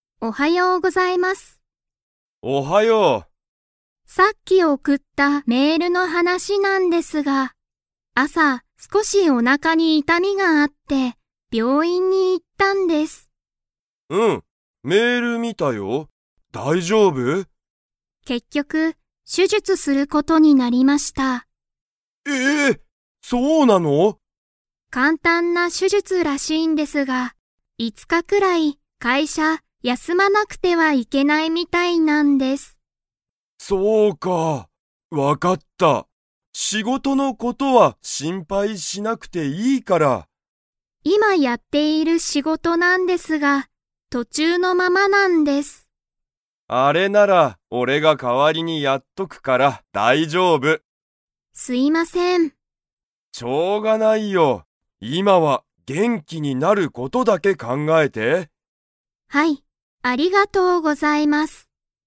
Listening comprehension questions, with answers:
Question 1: 田中たなかさんは、何なにが途中とちゅうのままですか?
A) 手術しゅじゅつ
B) 休やすみ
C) 仕事しごと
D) おなかの痛いたみ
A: C) 仕事しごと

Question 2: 鈴木すずきさんは、田中たなかさんの仕事しごとを 。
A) やっておく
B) やらない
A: A) やっておく

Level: Level 4

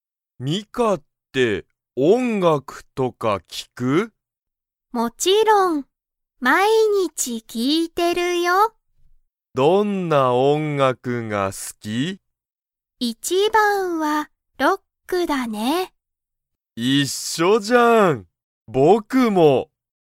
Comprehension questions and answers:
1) タクヤはロックが好(す)きですか?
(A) はい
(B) いいえ)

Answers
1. (A) はい

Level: Level 1

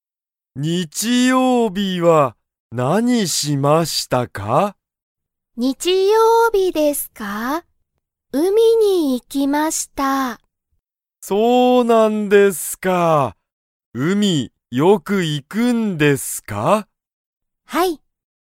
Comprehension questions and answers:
Comprehension Quiz (Skip if you don't understand the conversation yet)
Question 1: 松本(まつもと)さんは、____、海(うみ)に行(い)った。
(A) 今日(きょう)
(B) 今度(こんど)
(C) 土曜日(どようび)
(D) 日曜日(にちようび)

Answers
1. (D) 日曜日(にちようび)

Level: Level 1

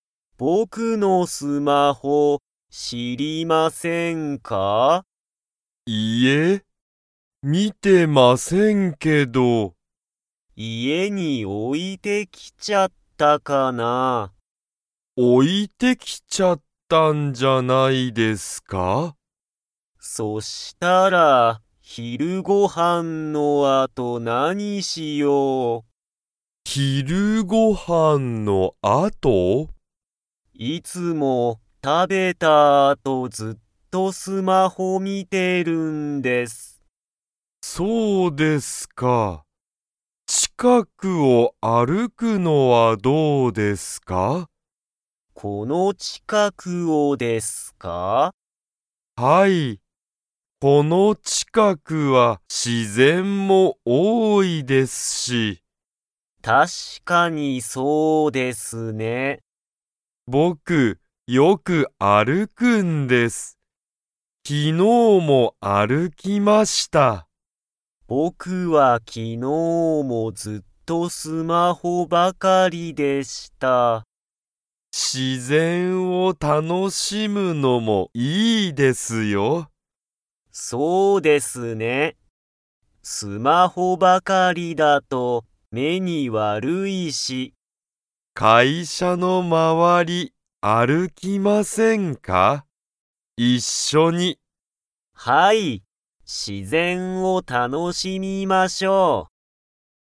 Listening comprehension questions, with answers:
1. 山本(やまもと)さんは、スマホを家(いえ)に____きたかもしれない。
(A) 食(た)べて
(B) 知(し)って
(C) 歩あるいて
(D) 置おいて)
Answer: (D) 置おいて)

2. 田中(たなか)さんと山本(やまもと)さんは、一緒(いっしょ)に歩(ある)きますか?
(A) はい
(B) いいえ)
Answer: (A) はい

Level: Level 2

